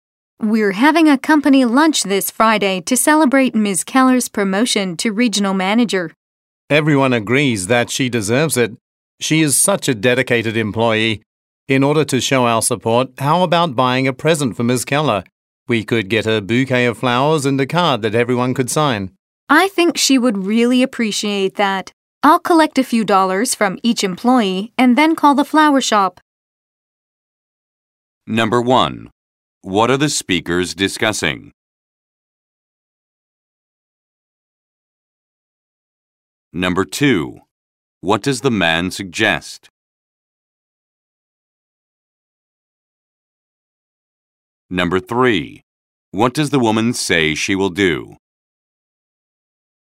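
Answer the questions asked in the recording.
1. A company lunch to celebrate Ms. Keller's promotion
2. Buying Ms. Keller a present (flowers and a card)
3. Collect money from employees and call the flower shop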